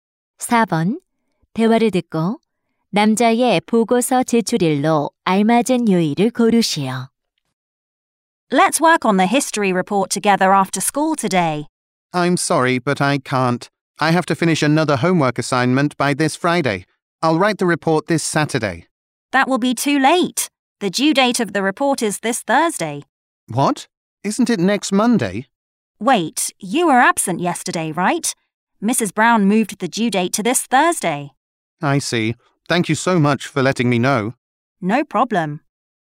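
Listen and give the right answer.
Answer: 목요일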